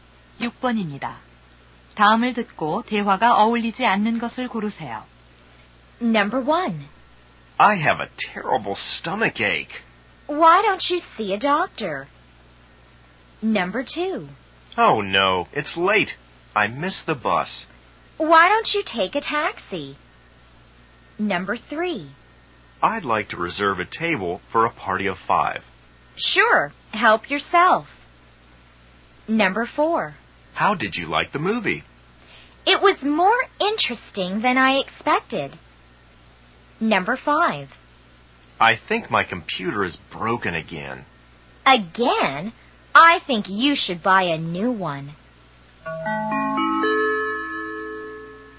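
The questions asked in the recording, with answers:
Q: 다음을 듣고 대화가 어울리지 않는 것을 고르세요.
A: 3: I'd like to reserve a table for a party of 5. / Sure. Help yourself.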